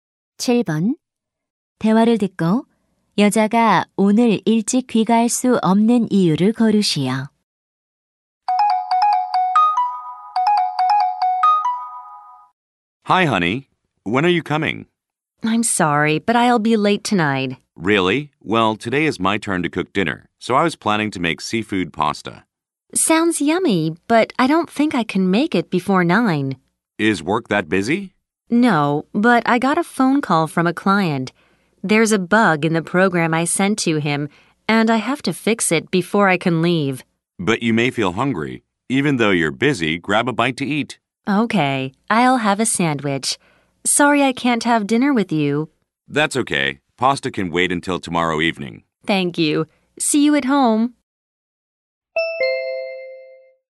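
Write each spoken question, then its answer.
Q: 대화를 듣고 여자가 오늘 일찍 귀가할 수 없는 이유를 고르시오.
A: 고객에게 보낸 프로그램의 오류를 고쳐야 해서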